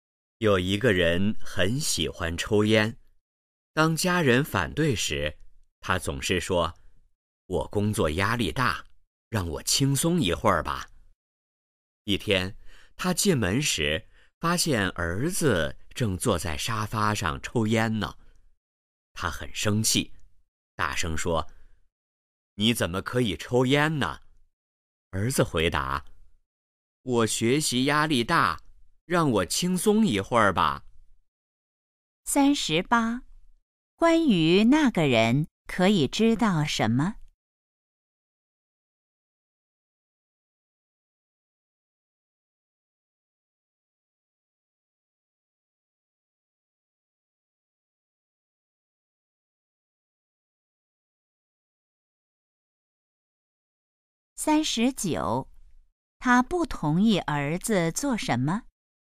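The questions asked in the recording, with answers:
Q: 他不同意儿子做什么?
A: 抽烟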